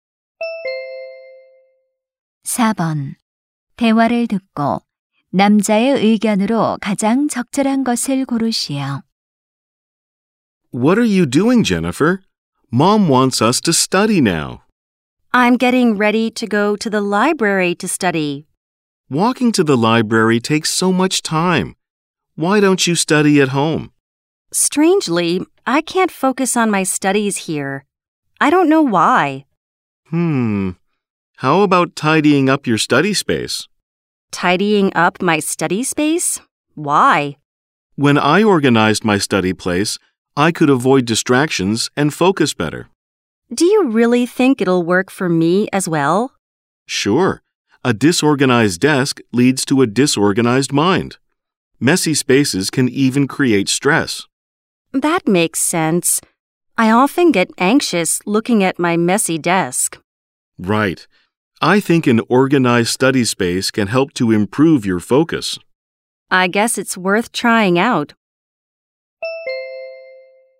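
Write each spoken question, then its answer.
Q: 대화를 듣고 남자의 의견으로 가장 적절한 것을 고르시오.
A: 정돈된 공부 공간은 집중력 향상에 도움이 된다.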